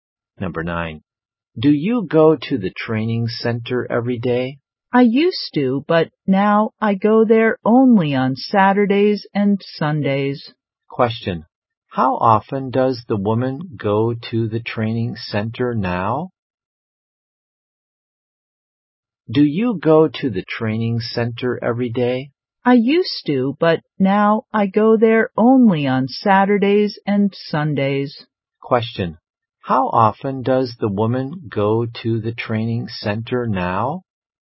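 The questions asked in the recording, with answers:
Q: How often does the woman go to the training center now?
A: Twice a week, on Saturdays and Sundays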